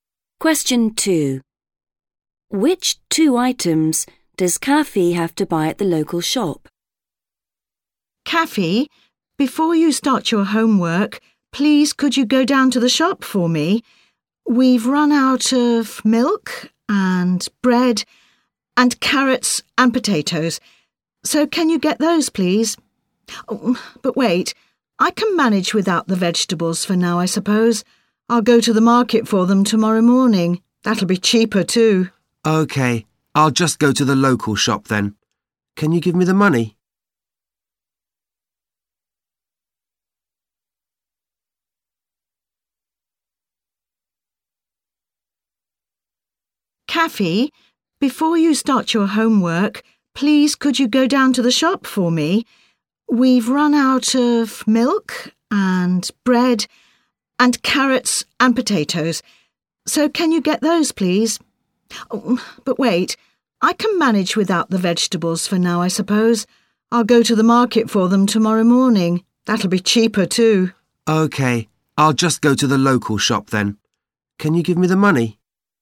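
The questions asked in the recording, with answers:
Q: Which two items does Kaffee have to buy at the local shop?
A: milk and bread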